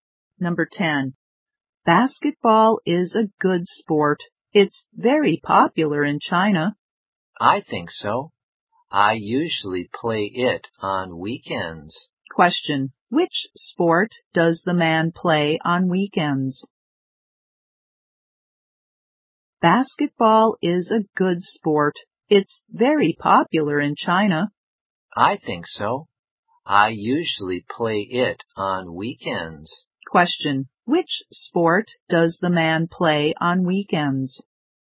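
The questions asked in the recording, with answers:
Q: Question, which sport does the man play on weekends?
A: Basketball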